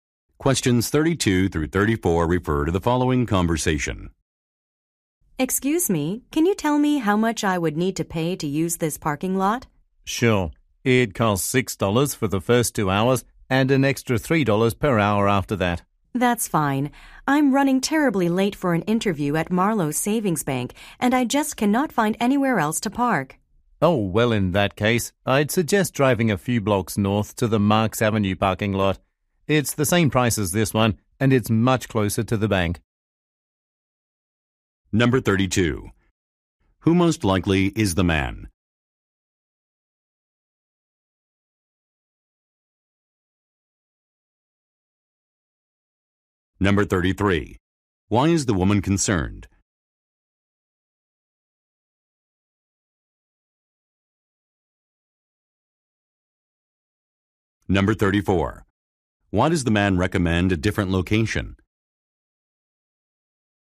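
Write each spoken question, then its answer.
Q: Why is the woman concerned?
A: She is late for an interview

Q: Why does the man recommend a different location?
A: It is much closer to the bank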